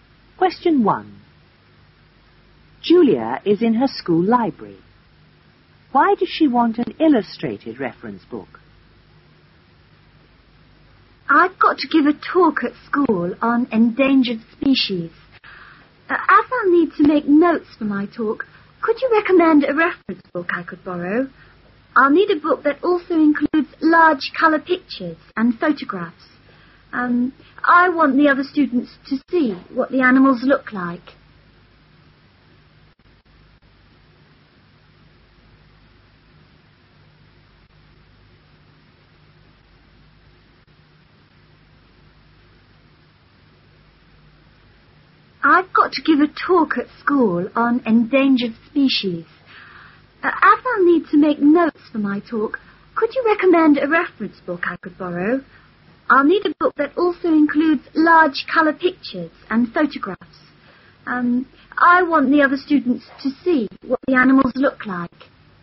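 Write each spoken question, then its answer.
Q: Why does she want an illustrated reference book?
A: So the other students can see what the animals look like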